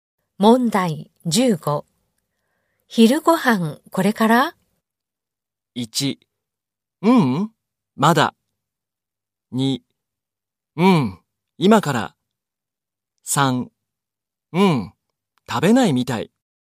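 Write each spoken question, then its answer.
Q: 昼ごはんこれから?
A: 2: うん、今から。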